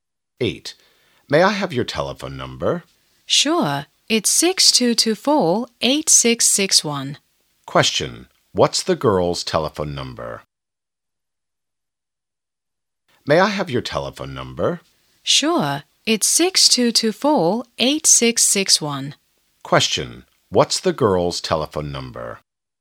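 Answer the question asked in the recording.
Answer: 6224-8661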